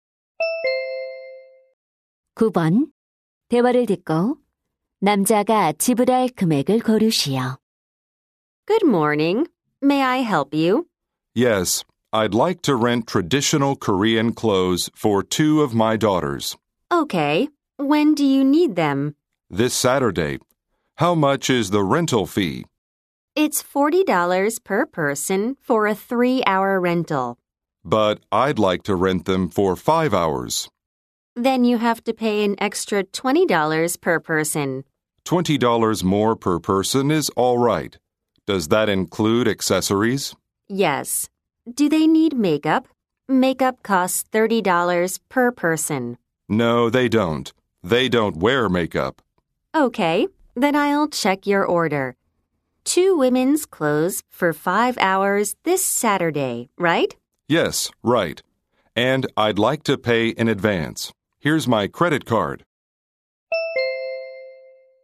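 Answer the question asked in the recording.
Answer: $120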